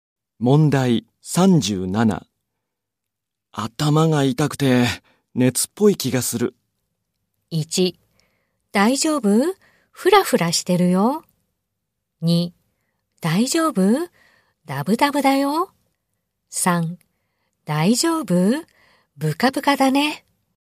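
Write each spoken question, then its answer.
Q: 頭が痛くて熱っぽい気がする。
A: 1: 大丈夫?フラフラしてるよ。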